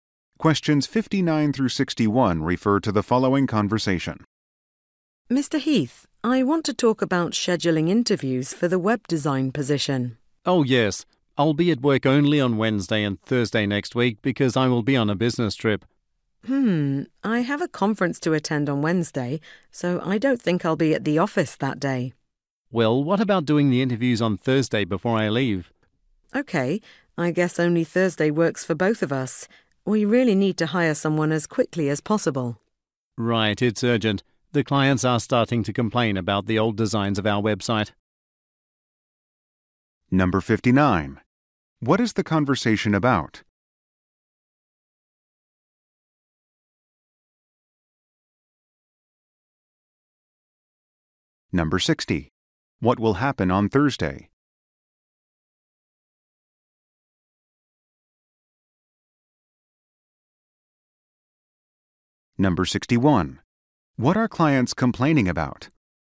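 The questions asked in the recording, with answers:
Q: What is the conversation about?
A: Scheduling interviews for the web design position

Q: What will happen on Thursday?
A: The interviews

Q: What are clients complaining about?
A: The old designs of the website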